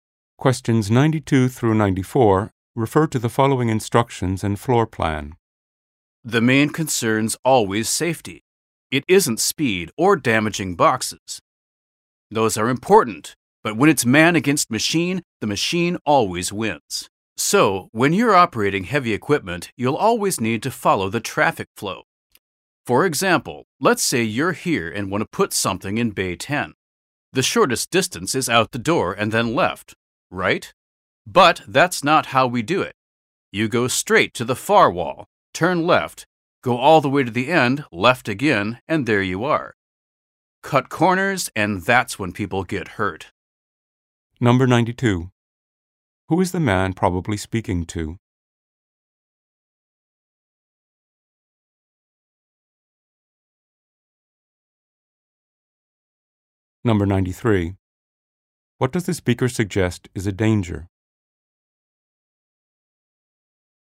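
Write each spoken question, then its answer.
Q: Who is the man probably speaking to?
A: Heavy equipment operators in a warehouse

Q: What does the speaker suggest is a danger?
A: Cutting corners instead of following the traffic flow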